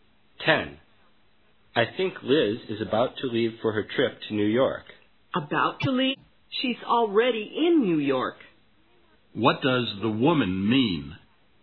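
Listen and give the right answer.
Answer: Liz has already left for New York.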